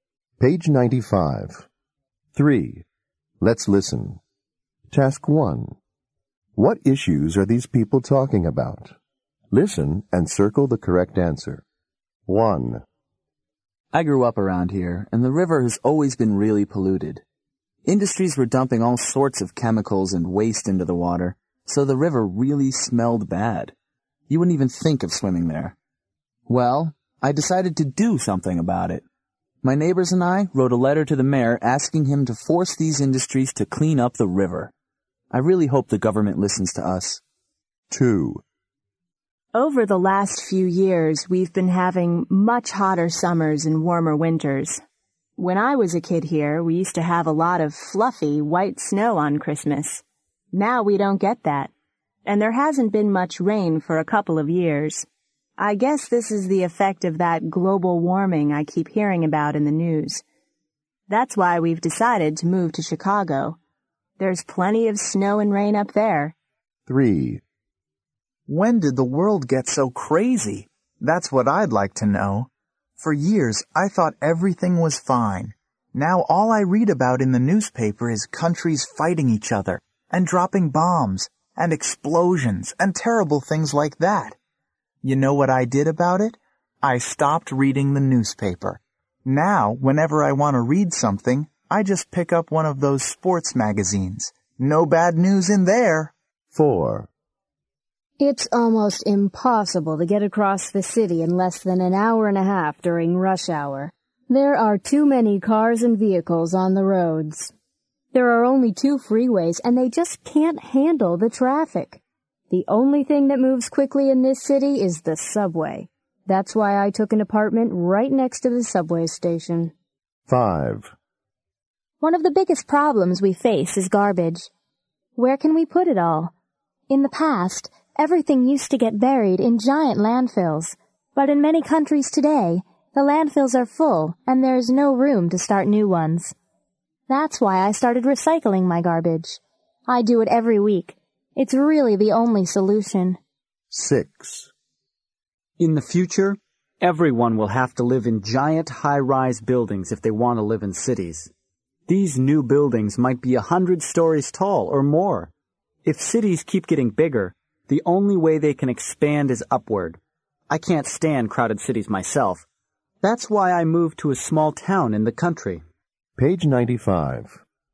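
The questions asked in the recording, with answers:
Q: What issues are these people talking about?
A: water pollution

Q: What issues are these people talking about?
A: global warming

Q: What issues are these people talking about?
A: war

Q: What issues are these people talking about?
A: traffic

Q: What issues are these people talking about?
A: garbage

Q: What issues are these people talking about?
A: growing, crowded cities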